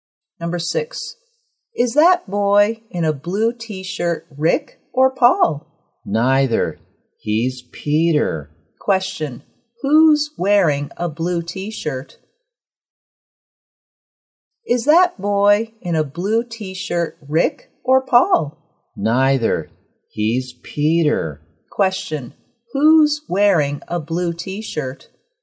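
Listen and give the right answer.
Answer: Peter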